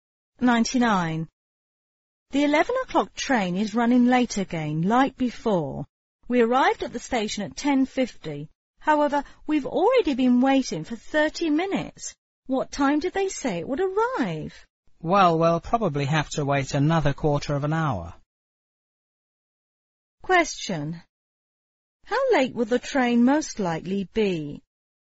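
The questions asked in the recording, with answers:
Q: How late will the train most likely be?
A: About 35 minutes late (arriving around 11:35)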